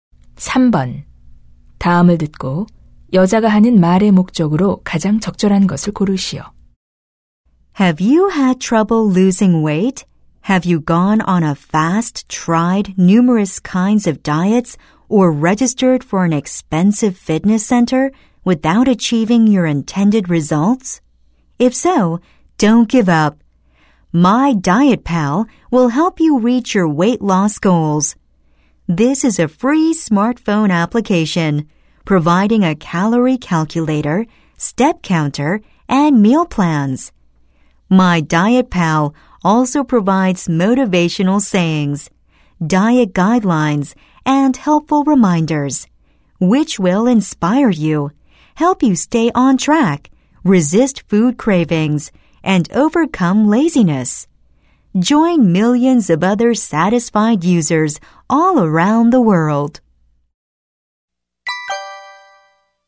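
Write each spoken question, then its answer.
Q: 다음을 듣고 여자가 하는 말의 목적으로 가장 적절한 것을 고르시오.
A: 다이어트 스마트폰 앱(My Diet Pal)을 홍보하려고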